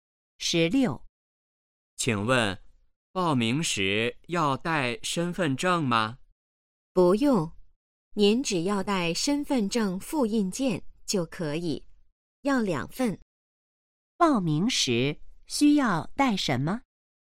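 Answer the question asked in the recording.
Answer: 两份身份证复印件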